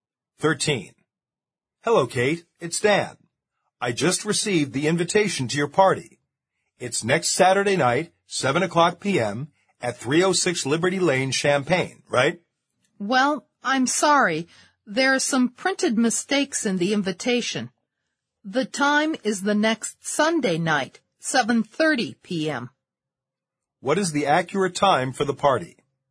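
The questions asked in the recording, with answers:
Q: What is the accurate time for the party?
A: Next Sunday night, 7:30 p.m.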